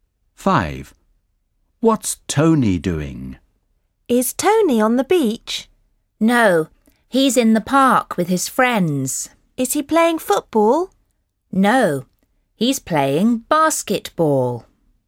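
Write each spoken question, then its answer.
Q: What's Tony doing?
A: playing basketball in the park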